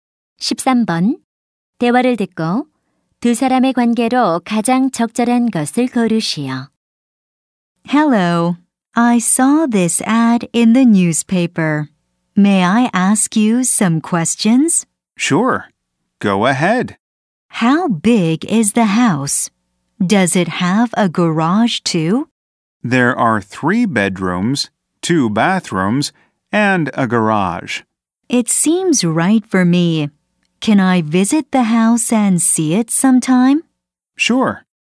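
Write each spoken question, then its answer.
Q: 대화를 듣고 두 사람의 관계로 가장 적절한 것을 고르시오.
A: 부동산 중개인과 고객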